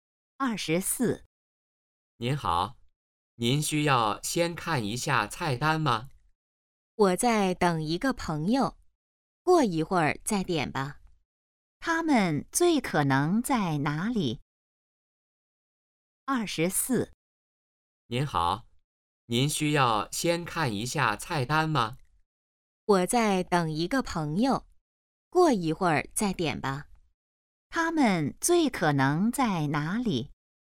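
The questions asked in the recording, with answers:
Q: 他们最可能在哪里?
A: 饭馆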